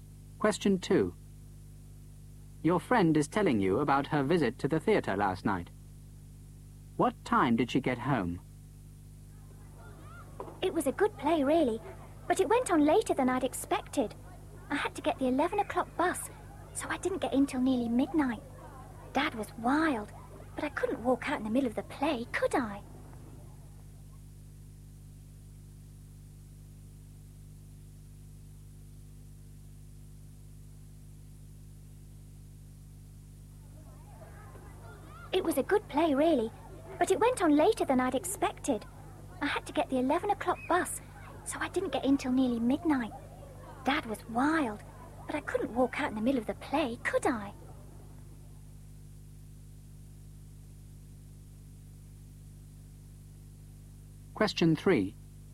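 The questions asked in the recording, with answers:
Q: What time did she get home?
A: Nearly midnight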